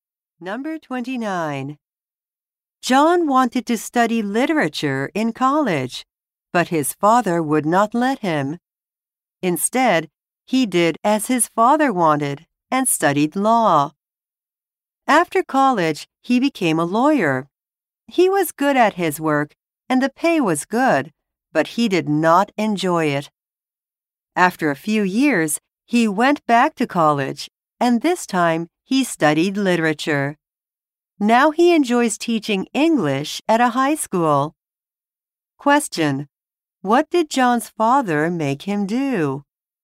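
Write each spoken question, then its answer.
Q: What did John's father make him do?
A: Study law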